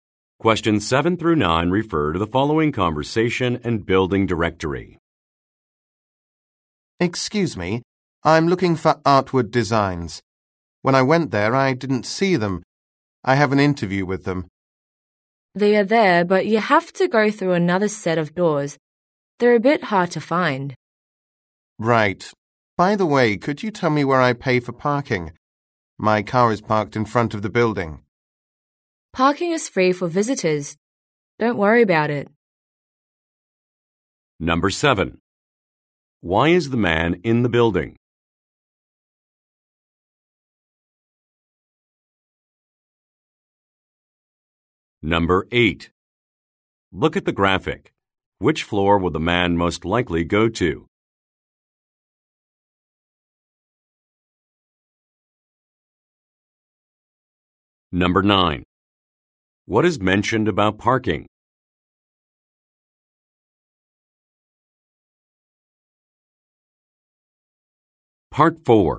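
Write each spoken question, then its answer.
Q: Why is the man in the building?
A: He has an interview

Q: What is mentioned about parking?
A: It is free for visitors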